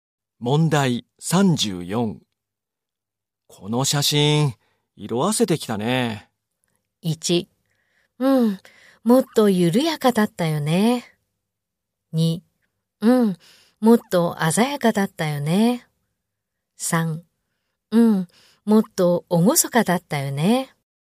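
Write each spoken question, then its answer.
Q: この写真、色あせてきたね。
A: 2: うん、もっと鮮やかだったよね。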